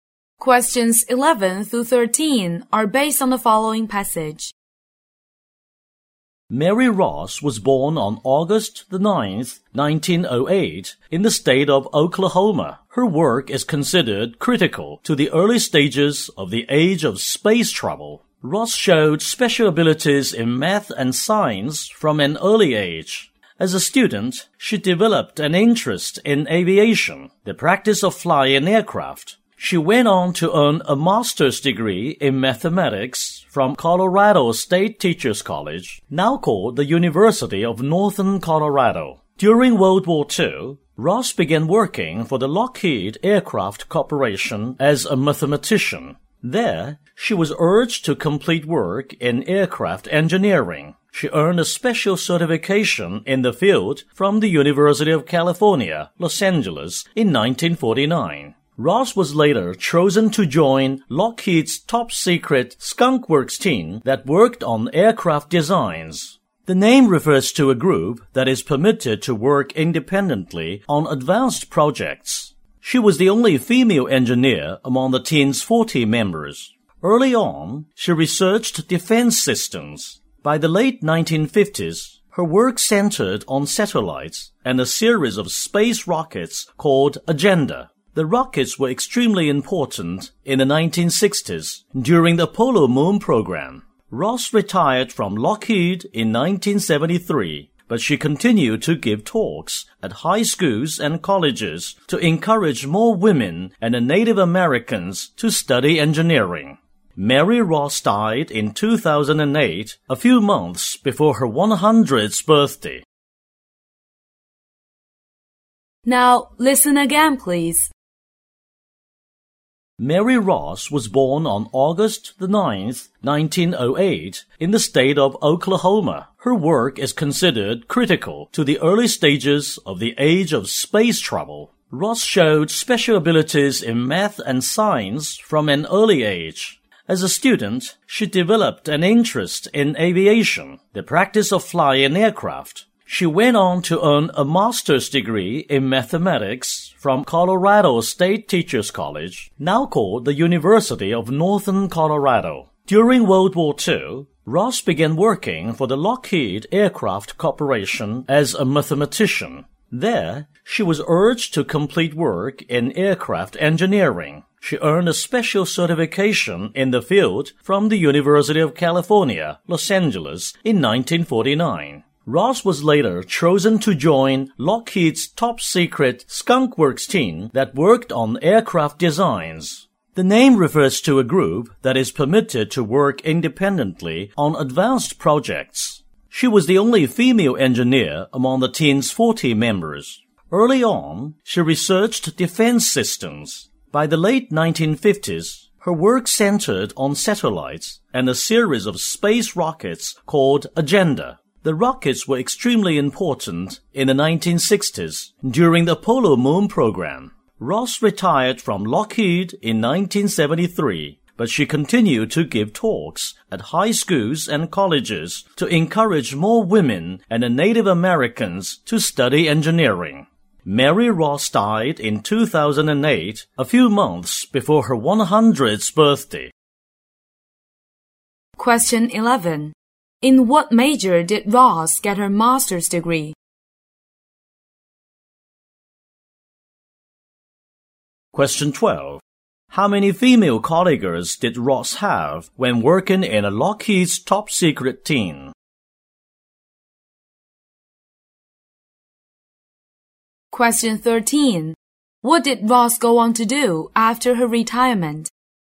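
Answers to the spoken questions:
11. Mathematics
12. None
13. Gave talks at schools and colleges to encourage women and Native Americans to study engineering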